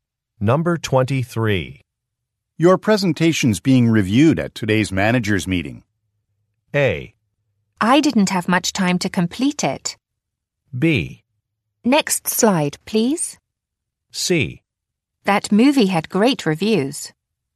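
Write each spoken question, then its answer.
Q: Your presentation's being reviewed at today's manager's meeting.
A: A: I didn't have much time to complete it.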